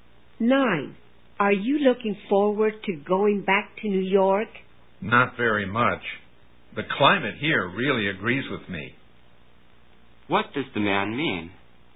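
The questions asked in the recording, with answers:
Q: What does the man mean?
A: He likes the climate here and doesn't really want to go back to New York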